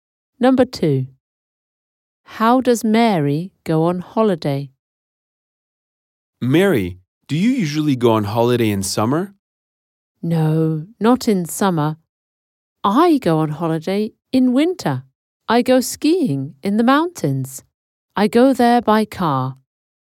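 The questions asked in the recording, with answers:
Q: How does Mary go on holiday?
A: By car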